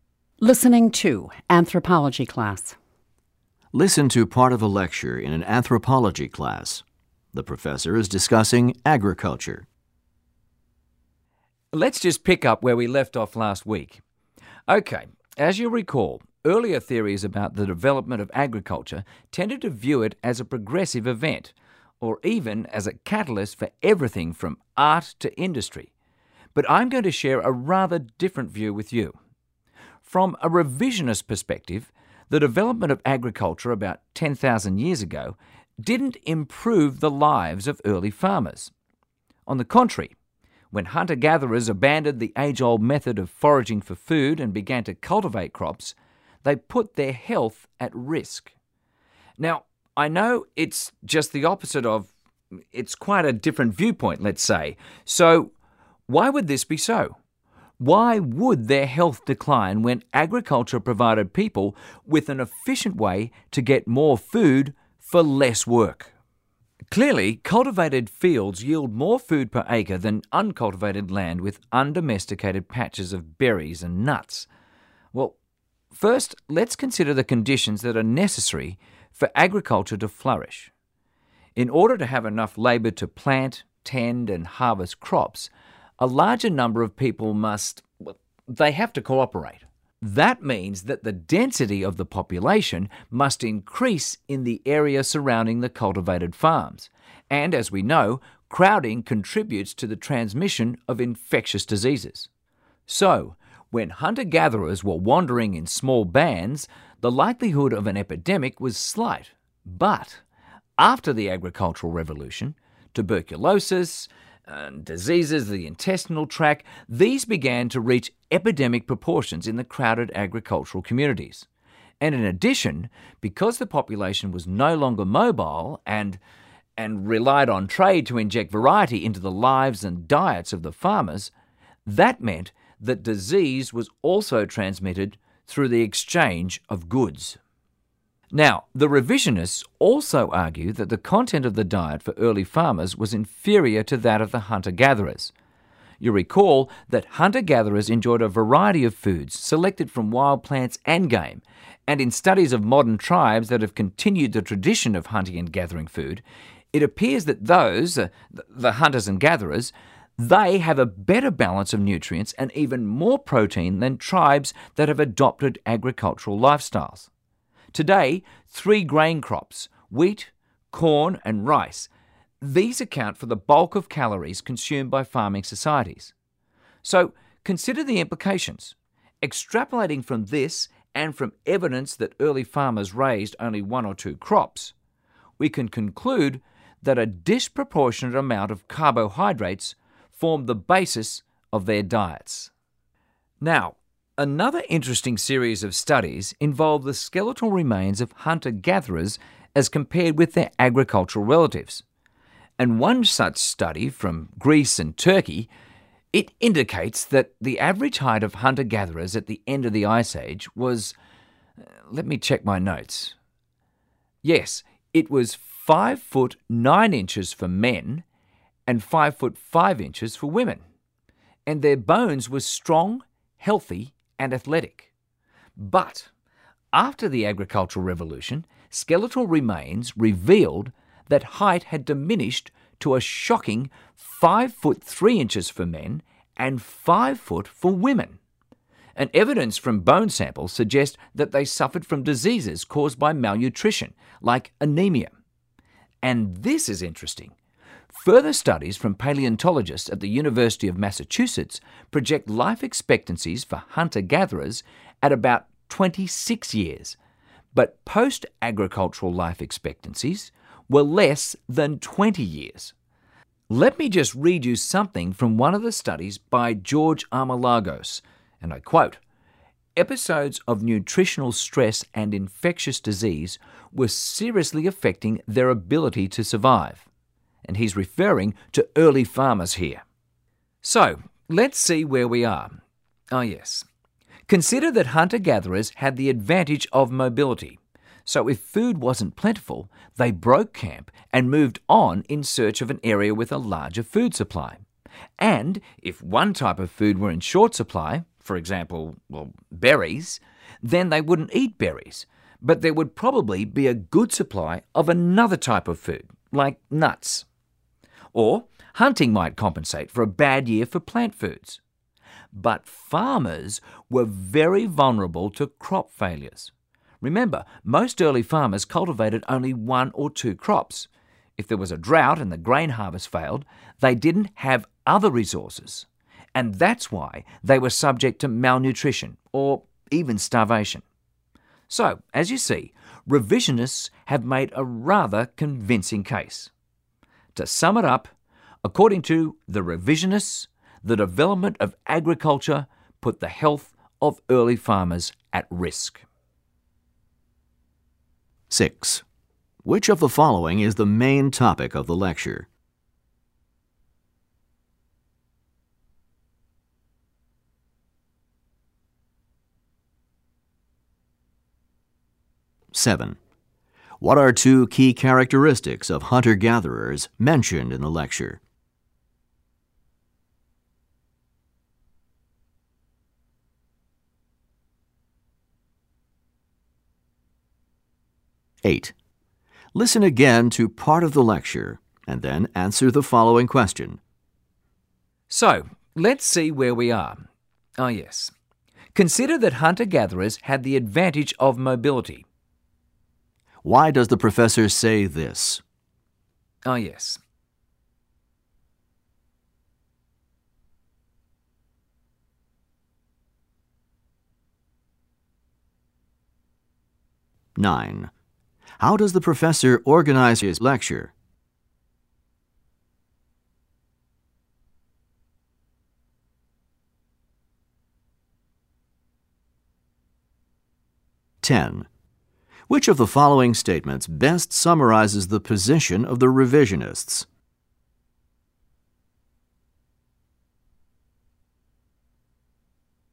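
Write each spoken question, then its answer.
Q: Which of the following is the main topic of the lecture?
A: The revisionist view that agriculture harmed the health of early farmers

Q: Which of the following statements best summarizes the position of the revisionists?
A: The development of agriculture put the health of early farmers at risk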